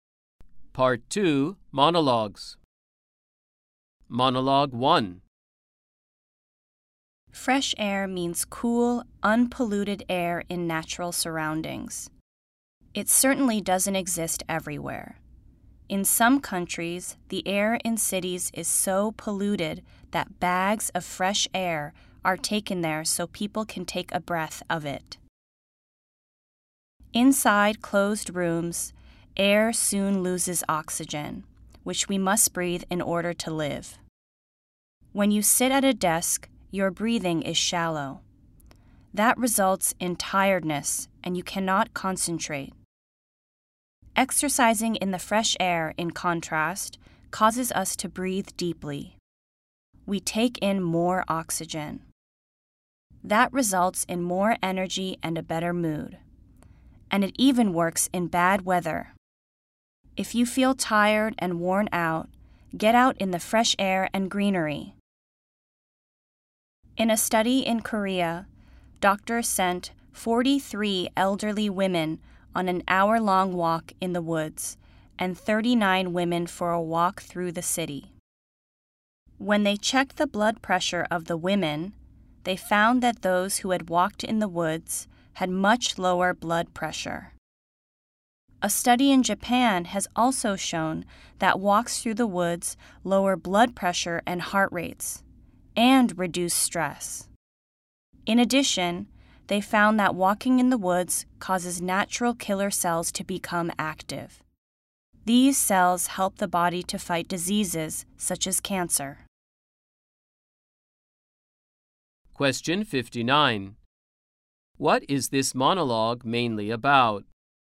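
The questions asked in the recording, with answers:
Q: What is this monologue mainly about?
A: The health benefits of fresh air and walking in nature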